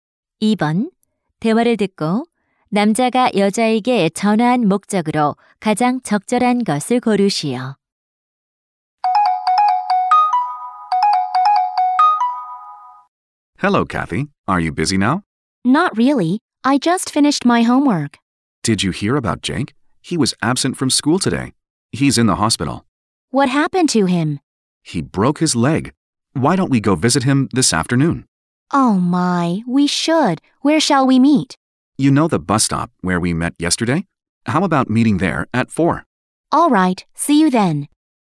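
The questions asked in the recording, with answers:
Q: 대화를 듣고 남자가 여자에게 전화한 목적으로 가장 적절한 것을 고르시오.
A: 병원에 입원한 Jake를 함께 병문안 가자고 제안하려고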